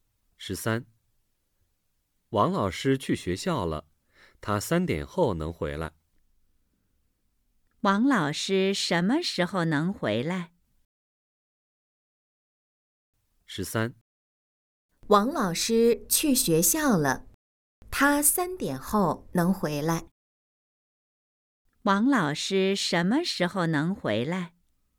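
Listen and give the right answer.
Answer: 三点后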